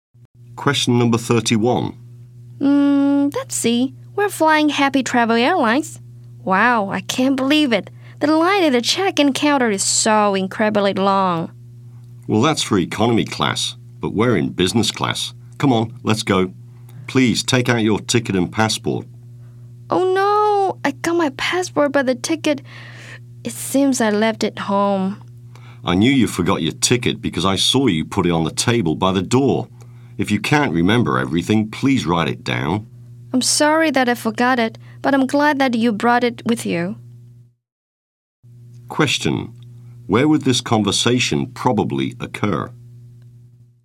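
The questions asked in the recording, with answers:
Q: Where would this conversation probably occur?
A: At the airport (check-in counter)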